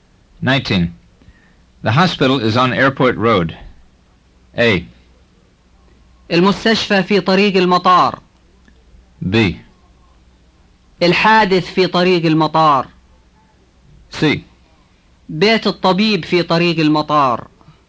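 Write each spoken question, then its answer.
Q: The hospital is on Airport Road.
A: A: المستشفى في طريق المطار.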